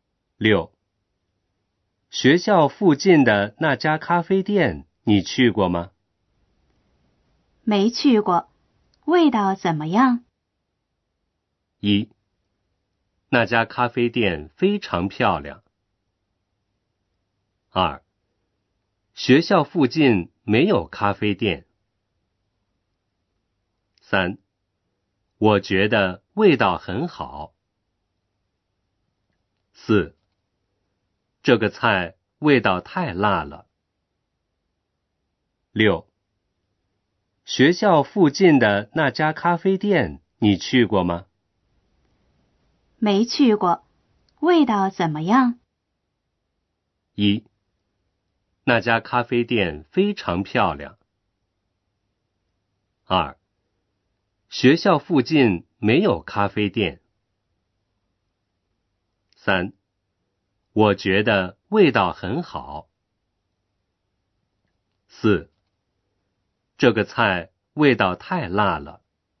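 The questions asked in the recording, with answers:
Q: 学校附近的那家咖啡店,你去过吗?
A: 三: 我觉得味道很好。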